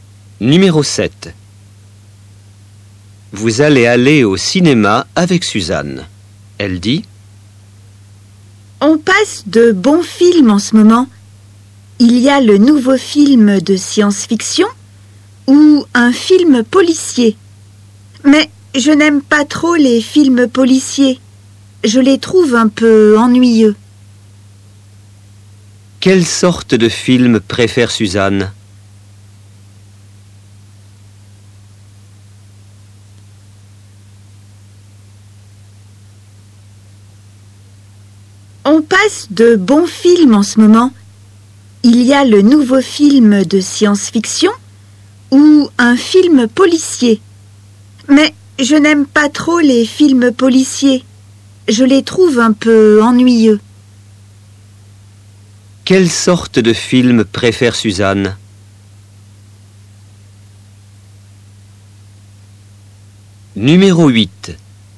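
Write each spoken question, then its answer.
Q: Quelle sorte de film préfère Suzanne?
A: les films de science-fiction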